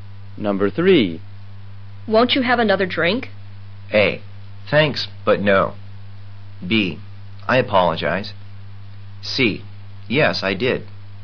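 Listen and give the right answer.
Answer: A: Thanks, but no.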